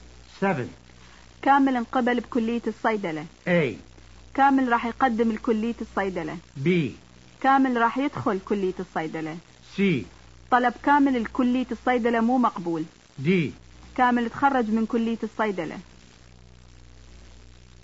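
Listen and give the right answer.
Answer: B: كامل راح يدخل كلية الصيدلة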